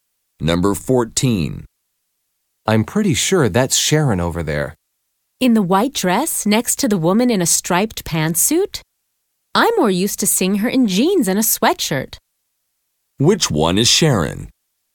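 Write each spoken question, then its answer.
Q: Which one is Sharon?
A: The one in the white dress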